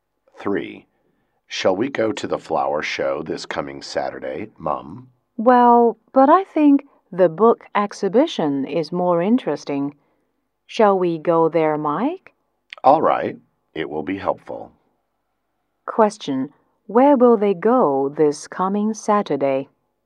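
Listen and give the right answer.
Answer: To the book exhibition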